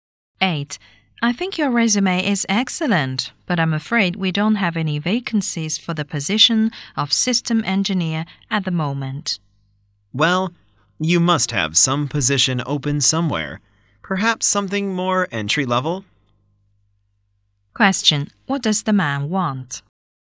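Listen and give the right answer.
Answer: A job, perhaps an entry-level position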